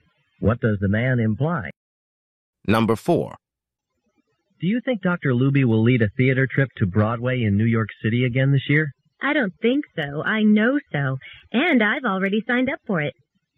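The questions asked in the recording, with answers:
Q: What does the woman mean?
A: She is sure Dr. Luby will lead the trip again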